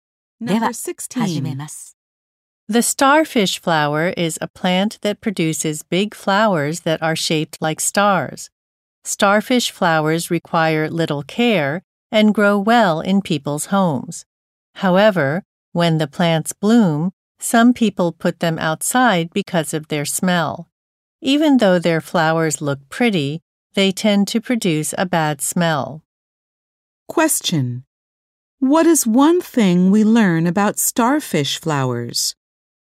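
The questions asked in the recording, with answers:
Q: What is one thing we learn about starfish flowers?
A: They produce a bad smell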